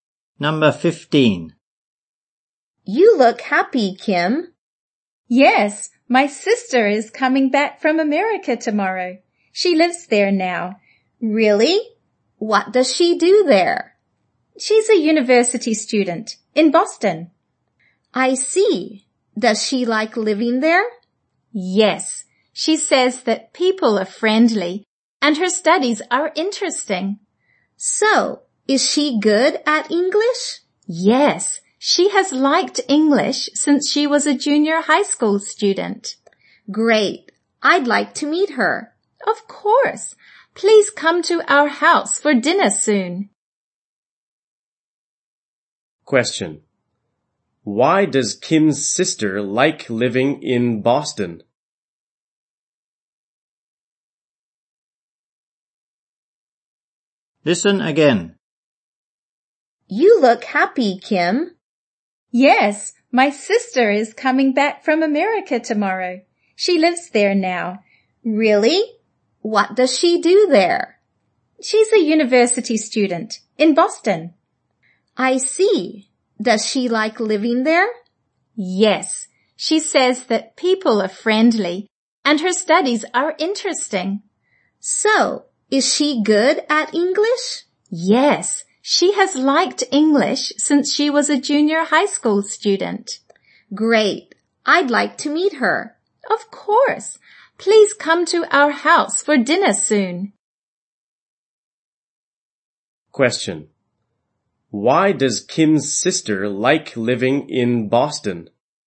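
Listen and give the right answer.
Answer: People are friendly and her studies are interesting.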